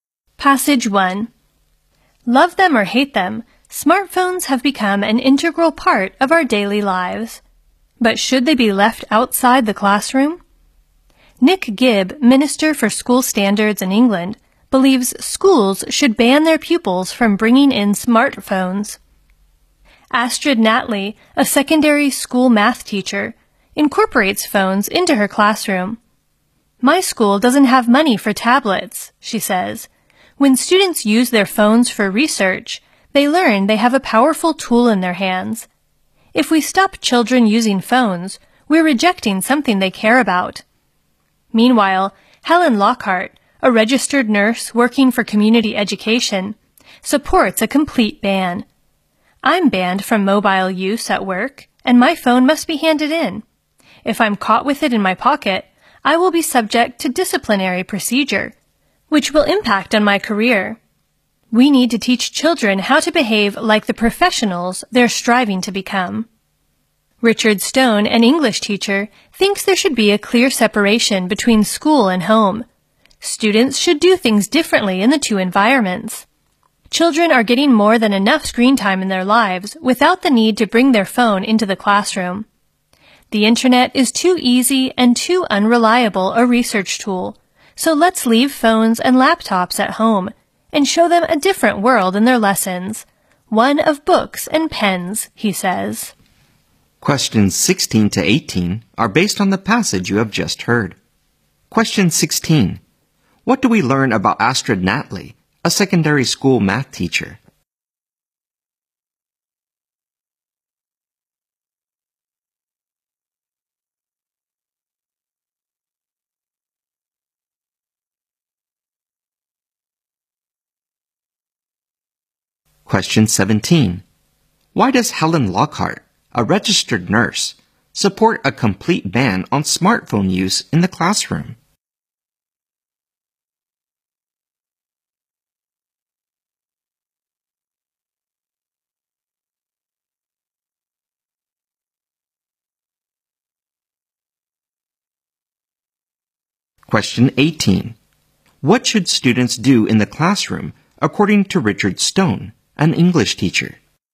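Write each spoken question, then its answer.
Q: What do we learn about Astrid Natley, a secondary school math teacher?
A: She uses phones in her classroom

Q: Why does Helen Lockhart, a registered nurse, support a complete ban on smartphone use in the classroom?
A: Children should learn to behave like professionals

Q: What should students do in the classroom, according to Richard Stone, an English teacher?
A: Use books and pens, not phones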